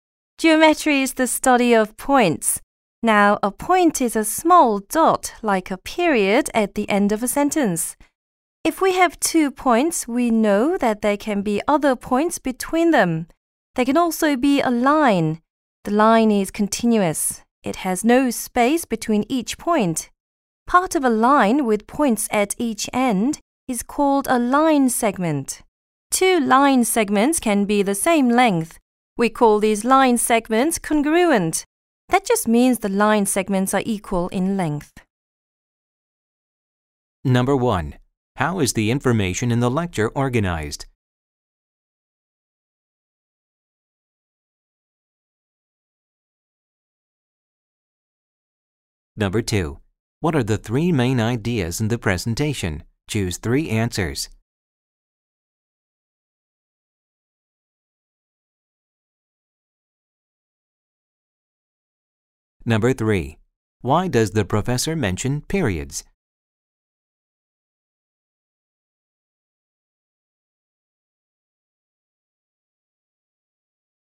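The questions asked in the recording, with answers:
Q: Why does the professor mention periods?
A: To show what a point looks like: a small dot, like a period at the end of a sentence.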